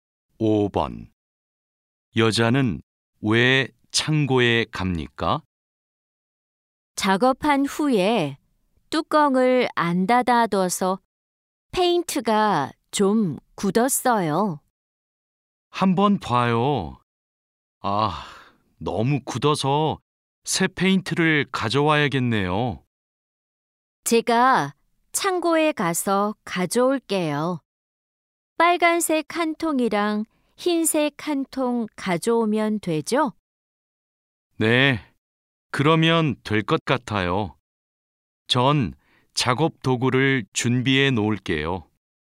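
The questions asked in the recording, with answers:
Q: 여자는 왜 창고에 갑니까?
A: 페인트가 굳어서 새 페인트를 가져오려고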